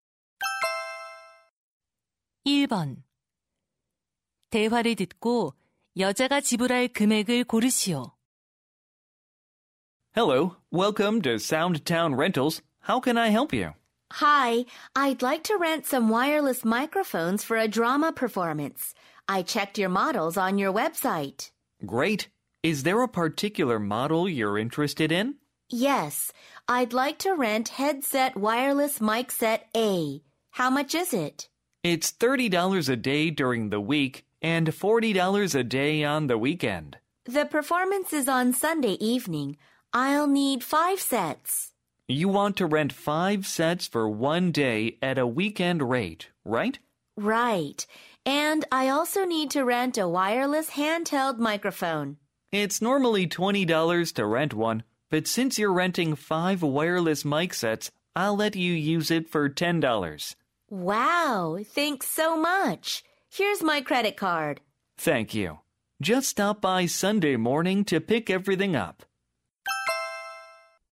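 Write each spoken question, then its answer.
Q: 대화를 듣고 여자가 지불할 금액을 고르시오.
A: $210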